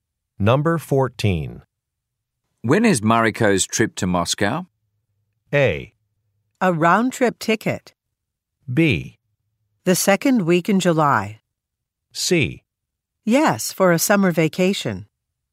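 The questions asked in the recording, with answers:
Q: When is Mariko's trip to Moscow?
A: B: The second week in July.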